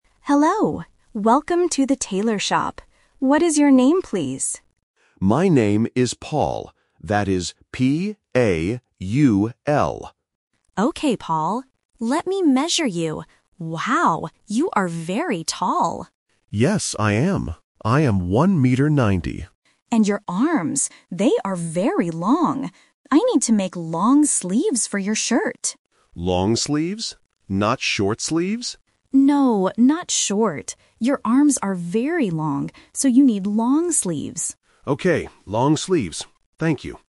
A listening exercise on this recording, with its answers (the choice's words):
Listen to the conversation and choose the correct answer (A, B, or C).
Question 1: How do you spell the customer's name?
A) P-O-L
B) P-A-U-L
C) P-A-L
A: P-A-U-L

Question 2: What does the tailor say about the customer?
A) He is short.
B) He is very tall.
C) He is thin.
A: He is very tall.

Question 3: What kind of sleeves does the customer need?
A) Long sleeves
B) Short sleeves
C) No sleeves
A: Long sleeves

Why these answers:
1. The customer spells his name clearly: "P-A-U-L." Why the trap is wrong: Option (A) P-O-L is a phonetic trap because the letter "O" and "AU" can sound similar to beginners. Option (C) P-A-L is missing letters.
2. The tailor says: "Wow, you are very tall!" and the customer confirms his height. Why the trap is wrong: Option (A) He is short is the opposite of what is said. Option (C) He is thin is a plausible description for a tall person but is not mentioned in the audio.
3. The tailor says twice that he needs "long sleeves" because of the customer's "long arms." Why the trap is wrong: Option (B) Short sleeves is a trap. The customer asks "Not short sleeves?", but the tailor says "No, not short."

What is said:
Tailor: Hello. Welcome to the tailor shop. What is your name, please?
Customer: My name is Paul. That is P-A-U-L.
Tailor: Okay, Paul. Let me measure you... Wow, you are very tall!
Customer: Yes, I am. I am one meter ninety.
Tailor: And your arms... they are very long. I need to make long sleeves for your shirt.
Customer: Long sleeves? Not short sleeves?
Tailor: No, not short. Your arms are very long, so you need long sleeves.